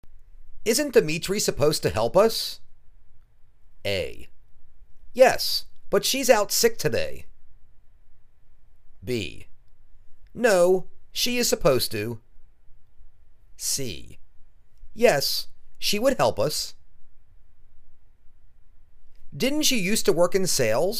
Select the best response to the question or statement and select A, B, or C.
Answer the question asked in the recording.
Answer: Yes, but she's out sick today.